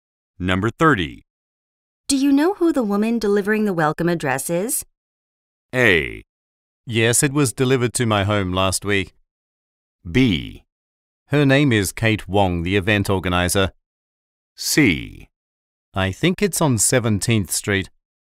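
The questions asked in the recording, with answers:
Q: Do you know who the woman delivering the welcome address is?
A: B: Her name is Kate Wong, the event organizer.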